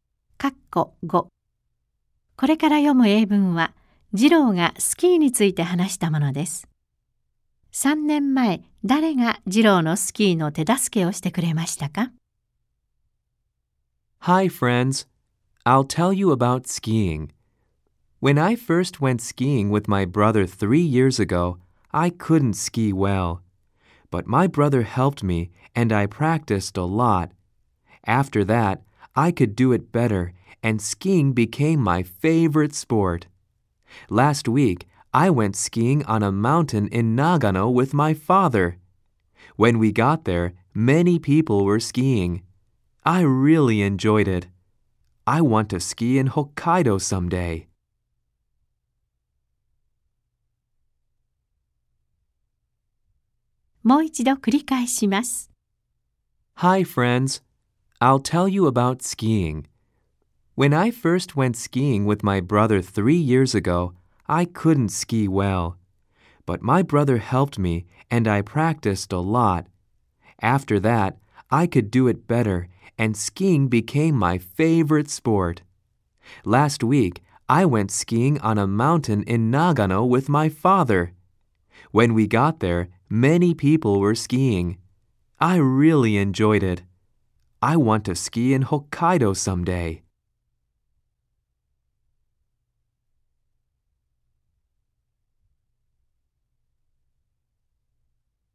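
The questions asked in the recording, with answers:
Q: 3年前、誰が次郎のスキーの手助けをしてくれましたか?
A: 兄(弟)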